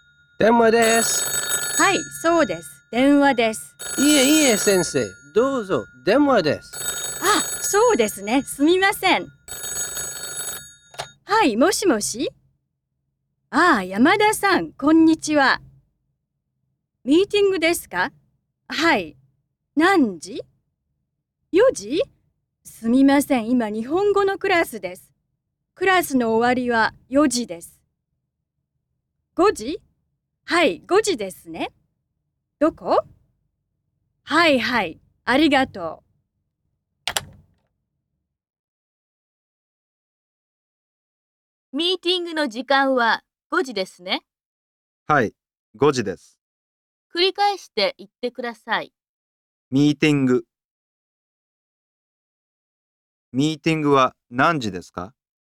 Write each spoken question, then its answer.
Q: ミーティングは何時ですか?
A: 5 時です。ミーティングは5時です。